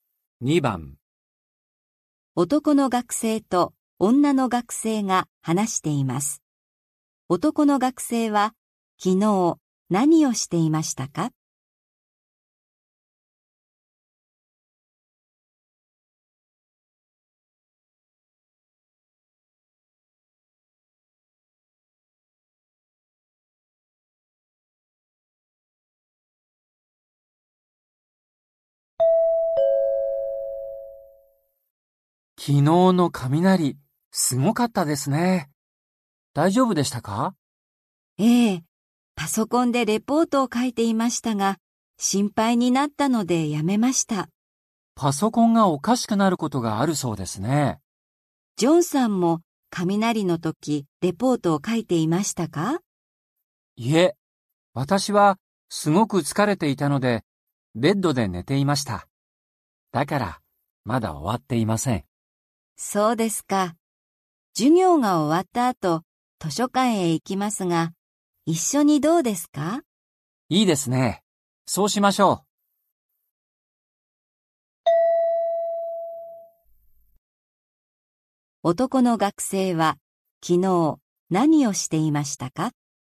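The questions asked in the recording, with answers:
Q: 男の学生は昨日何をしていましたか?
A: ベッドで寝ていました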